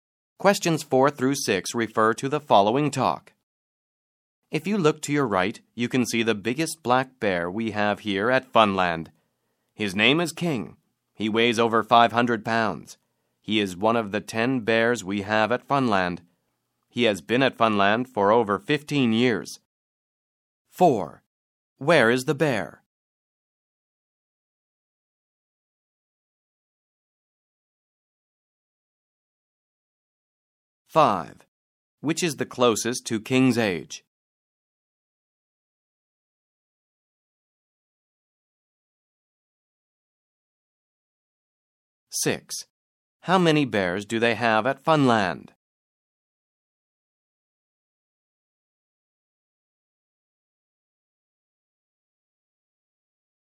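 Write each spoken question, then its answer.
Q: How many bears do they have at Funland?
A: 10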